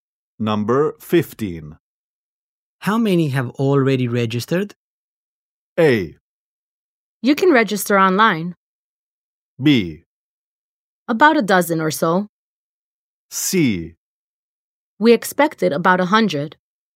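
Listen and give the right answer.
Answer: B: About 12 or so.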